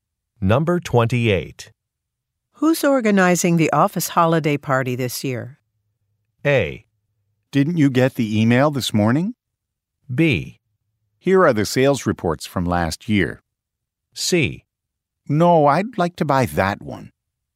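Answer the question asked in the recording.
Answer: A: Didn't you get the email this morning?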